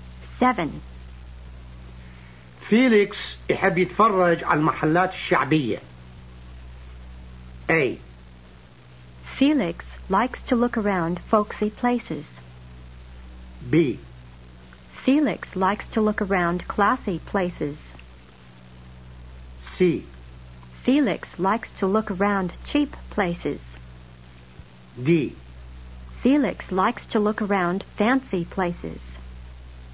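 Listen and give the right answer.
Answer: A: Felix likes to look around folksy places.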